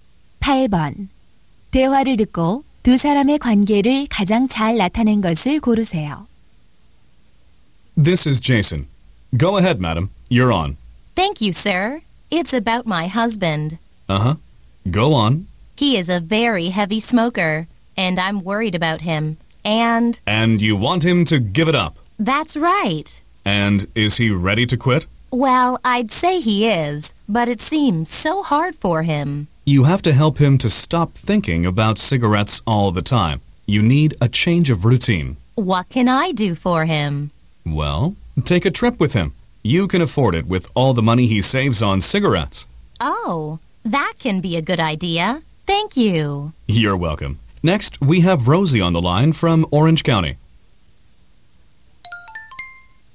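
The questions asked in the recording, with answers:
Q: 대화를 듣고 두 사람의 관계를 가장 잘 나타낸 것을 고르세요.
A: 라디오 상담 진행자 - 청취자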